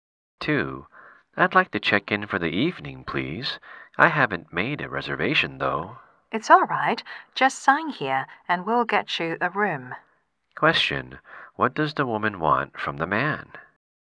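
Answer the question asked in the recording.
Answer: A hotel room for the night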